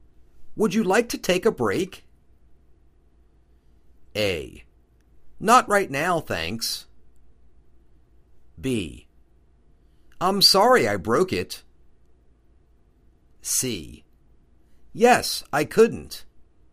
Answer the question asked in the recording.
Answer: Not right now, thanks.